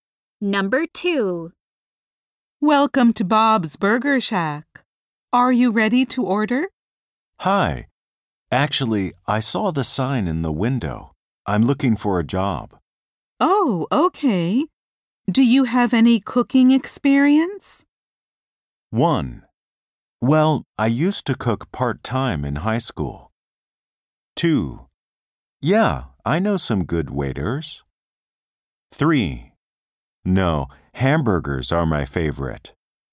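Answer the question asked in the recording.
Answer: 1: Well, I used to cook part-time in high school.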